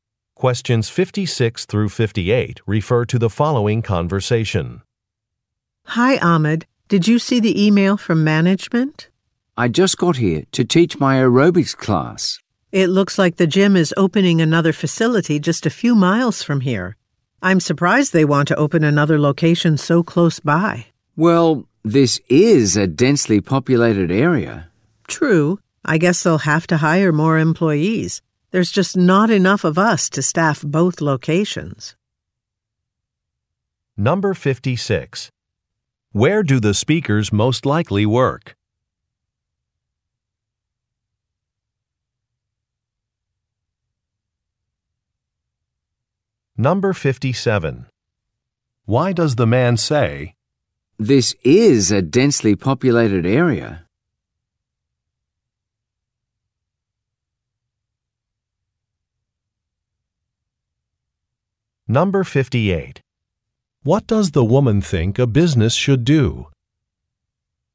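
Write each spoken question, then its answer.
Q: Where do the speakers most likely work?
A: At a gym

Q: "This is a densely populated area"?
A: To explain why a nearby location makes sense

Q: What does the woman think a business should do?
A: Hire more employees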